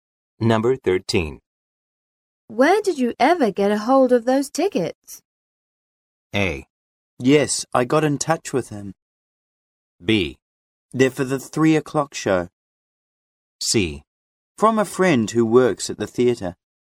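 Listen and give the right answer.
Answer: C: From a friend who works at the theatre.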